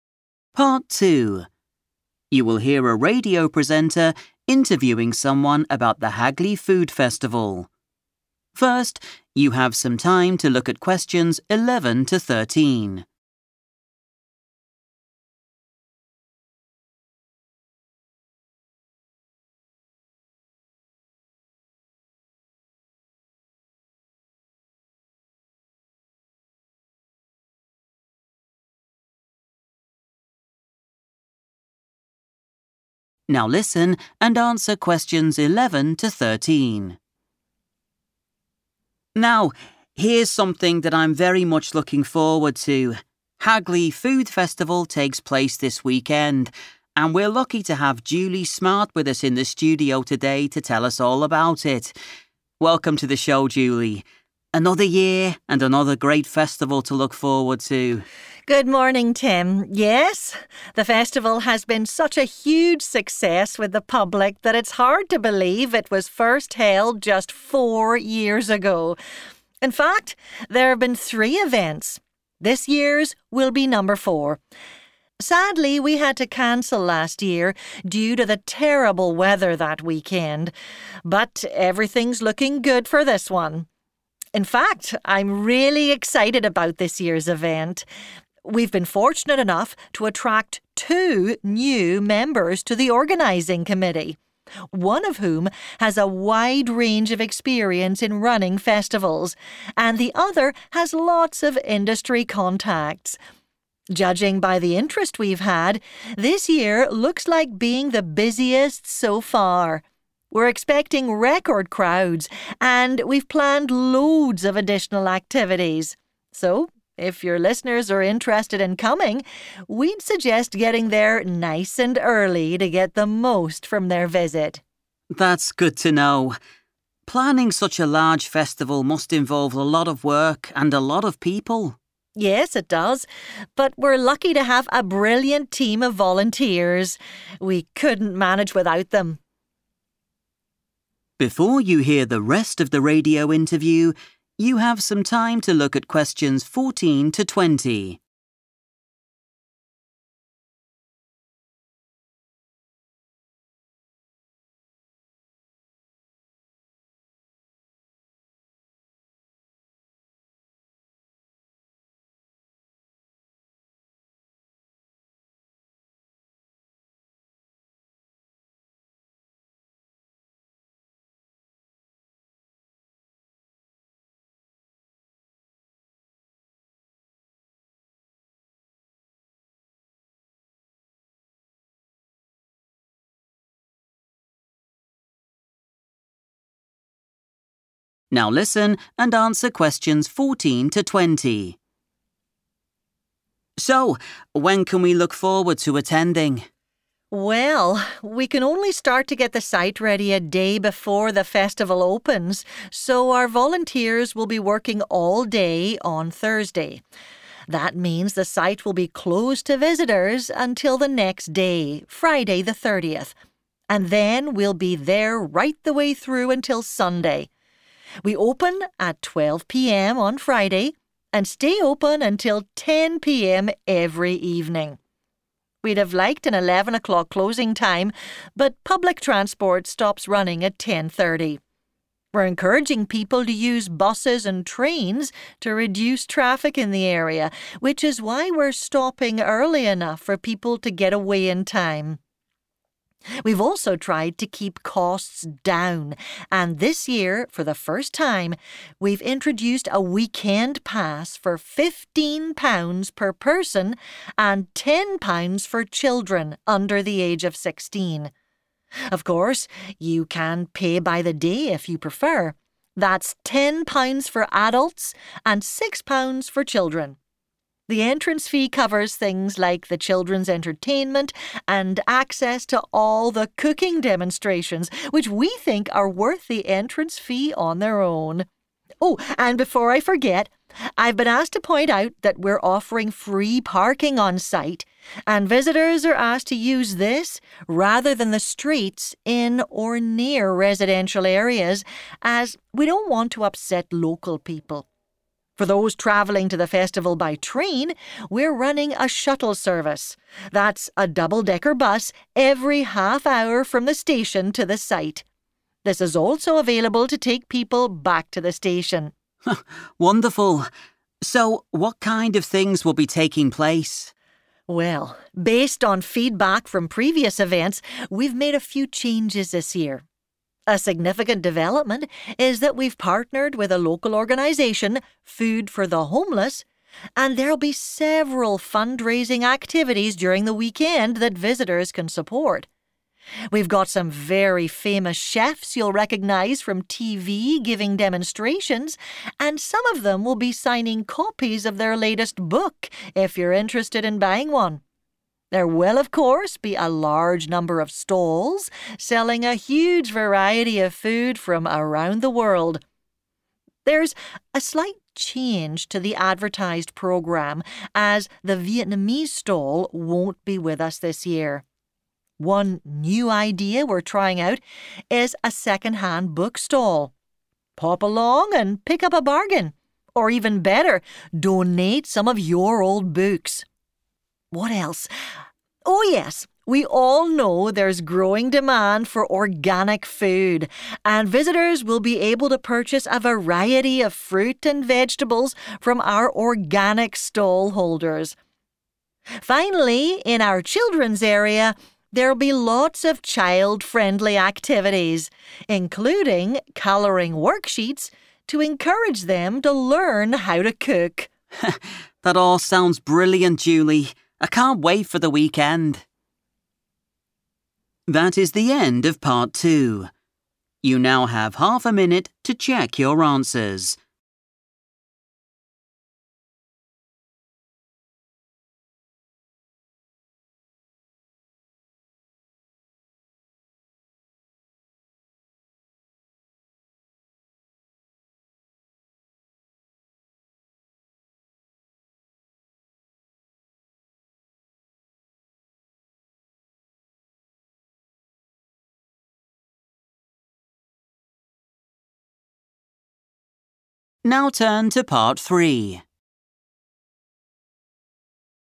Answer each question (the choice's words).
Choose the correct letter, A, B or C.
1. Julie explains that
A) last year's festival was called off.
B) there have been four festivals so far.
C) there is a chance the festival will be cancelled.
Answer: last year's festival was called off.

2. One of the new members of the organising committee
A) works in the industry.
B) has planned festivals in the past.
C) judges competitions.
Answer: has planned festivals in the past.

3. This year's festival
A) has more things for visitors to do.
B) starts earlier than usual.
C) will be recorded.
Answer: has more things for visitors to do.

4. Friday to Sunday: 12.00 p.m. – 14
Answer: 10 p.m. / 10 pm

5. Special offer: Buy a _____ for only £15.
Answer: weekend pass

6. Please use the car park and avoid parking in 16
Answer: residential areas / the street

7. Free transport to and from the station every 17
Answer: half hour / 30 minutes

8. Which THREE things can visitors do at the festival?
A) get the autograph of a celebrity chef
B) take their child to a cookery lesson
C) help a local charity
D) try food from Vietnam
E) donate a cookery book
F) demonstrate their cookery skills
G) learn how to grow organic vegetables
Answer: get the autograph of a celebrity chef

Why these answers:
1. The correct answer is choice A because Julie mentions that they 'had to cancel last year' because the weather was very bad. This means the event was 'called off' or stopped from happening. Choice B is wrong because this year is only the fourth festival, meaning there have only been three before it. Choice C is wrong because Julie says everything looks good for this year's event and doesn't mention a chance of it being cancelled now.
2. The correct answer is B because Julie says the committee has two new people. One of these people has a lot of "experience in running festivals." In this context, "running" means the same as organizing or planning. So, this person has already planned festivals in the past. Choice A is not quite right because the transcript says the other person has industry "contacts," which only means they know people in the industry. Choice C is incorrect because Julie used the word "judging" to talk about how busy they think the event will be, not about a competition judge.
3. The correct answer is A because the speaker, Julie, mentions that the organizers have arranged many extra events and tasks for the guests this year. She uses the word "additional," which is a synonym for "extra" or "more," and the word "activities," which refers to the "things for visitors to do." She also notes that they expect this to be their busiest year, which supports the idea of it being a larger event with more to offer.
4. The correct answer is found where Julie discusses the festival's operating hours. She clearly states the opening time and then provides the closing time, mentioning it remains the same for each night of the event. Although they thought about closing later, they chose this time because of when public transport stops.
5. The correct answer is 'weekend pass' because the speaker mentions it as a new ticket option created to help save money for visitors. She specifically states that the cost for this pass is '£15 per person', which matches the price mentioned in the notes. Words like 'introduced' and '£15' help identify that this is the specific item being offered for that price.
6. The correct answer is found in the part of the talk where Julie discusses transport and parking. She explains that the festival has a free car park. She asks visitors to use it instead of parking on the 'streets' or in 'residential areas.' This is because she does not want to bother or 'upset local people' who live in those neighborhoods.
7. The correct answer is found when Julie explains how people can get to the festival if they come by train. She mentions a shuttle service, which is a bus that travels regularly between two places. She specifically states that this bus runs every half hour. In time, a half hour is equal to 30 minutes.
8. The correct answer is A, C, and E because Julie Smart lists these specific opportunities in her description of the event. To support option A, she mentions that famous TV chefs will be 'signing' books, which is a way to get an autograph. For option C, she explains that the festival is working with a 'local organisation' to raise money ('fundraising') for the homeless. For option E, she suggests that visitors can 'donate' their old books to a 'second-hand book stall.'

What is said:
Interviewer: Now, here's something that I'm very much looking forward to. Hagley Food Festival takes place this weekend and we're lucky to have Julie Smart with us in the studio today to tell us all about it. Welcome to the show, Julie. Another year and another great festival to look forward to.
Julie: Good morning, Tim. Yes, the festival has been such a huge success with the public that it's hard to believe it was first held just four years ago. In fact, there have been three events; this year's will be number four. Sadly, we had to cancel last year due to the terrible weather that weekend. But everything's looking good for this one. In fact, I'm really excited about this year's event. We've been fortunate enough to attract two new members to the organising committee, one of whom has a wide range of experience in running festivals, and the other has lots of industry contacts. Judging by the interest we've had, this year looks like being the busiest so far. We're expecting record crowds and we've planned loads of additional activities. So, if your listeners are interested in coming, we'd suggest getting there nice and early to get the most from their visit.
Interviewer: That's good to know. Planning such a large festival must involve a lot of work and a lot of people.
Julie: Yes, it does, but we're lucky to have a brilliant team of volunteers. We couldn't manage without them.
Interviewer: So, when can we look forward to attending?
Julie: Well, we can only start to get the site ready a day before the festival opens so our volunteers will be working all day on Thursday. That means the site will be closed to visitors until the next day, Friday the 30th, and then we'll be there right the way through until Sunday. on Friday and stay open until 10.00 p.m. every evening. We'd have liked an eleven o'clock closing time but public transport stops running at ten thirty. We're encouraging people to use buses and trains to reduce traffic in the area, which is why we're stopping early enough for people to get away in time. We've also tried to keep costs down and this year, for the first time, we've introduced a weekend pass for £15 per person and £10 for children under the age of 16. Of course, you can pay by the day if you prefer: that's £10 for adults and £6 for children. The entrance fee covers things like the children's entertainment and access to all the cooking demonstrations, which we think are worth the entrance fee on their own. Oh, and before I forget, I've been asked to point out that we're offering free parking on site and visitors are asked to use this rather than the streets in or near residential areas as we don't want to upset local people. For those travelling to the festival by train, we're running a shuttle service – that's a double-decker bus - every half hour from the station to the site. This is also available to take people back to the station.
Interviewer: Wonderful! So, what kind of things will be taking place?
Julie: Well, based on feedback from previous events, we've made a few changes this year. A significant development is that we've partnered with a local organisation, Food for the Homeless, and there'll be several fundraising activities during the weekend that visitors can support. We've got some very famous chefs you'll recognise from TV giving demonstrations and some of them will be signing copies of their latest book if you're interested in buying one. There will, of course, be a large number of stalls selling a huge variety of food from around the world. There's a slight change to the advertised programme as the Vietnamese stall won't be with us this year. One new idea we're trying out is a second-hand book stall. Pop along and pick up a bargain, or even better, donate some of your old books. What else? Oh yes, we all know there's growing demand for organic food and visitors will be able to purchase a variety of fruit and vegetables from our organic stall holders. Finally, in our children's area, there'll be lots of child-friendly activities, including colouring worksheets to encourage them to learn how to cook.
Interviewer: That all sounds brilliant, Julie. I can't wait for the weekend!